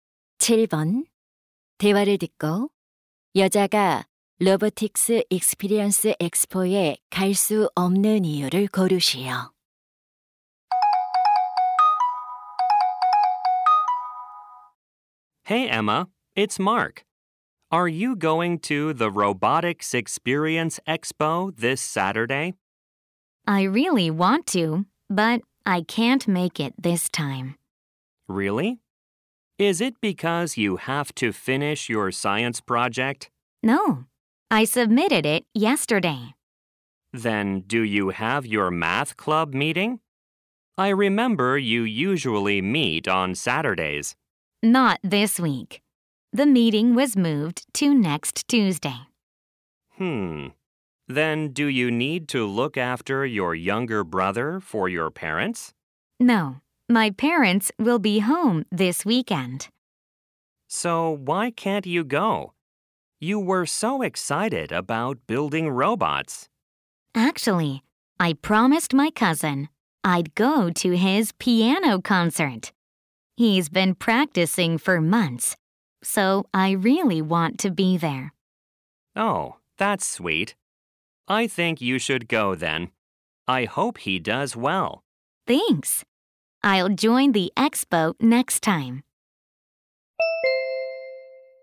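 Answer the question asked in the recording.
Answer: 사촌의 피아노 연주회에 가기로 약속해서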